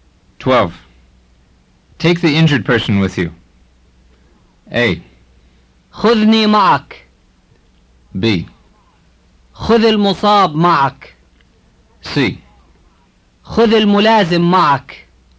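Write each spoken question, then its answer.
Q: Take the injured person with you.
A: B: خذ المصاب معك.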